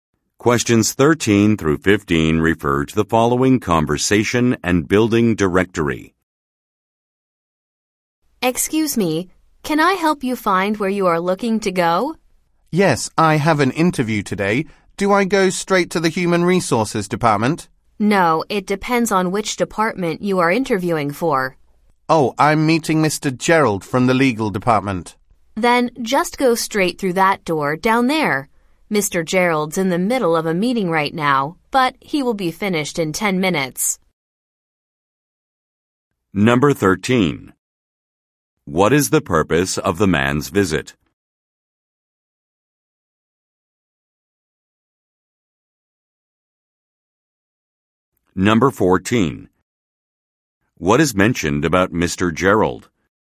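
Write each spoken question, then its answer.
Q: What is the purpose of the man's visit?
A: To have a job interview

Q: What is mentioned about Mr.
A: He is in a meeting that will finish in 10 minutes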